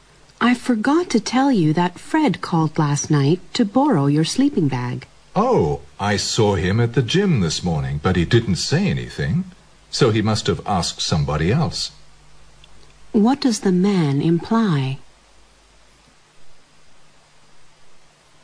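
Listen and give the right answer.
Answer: Fred probably borrowed a sleeping bag from someone else.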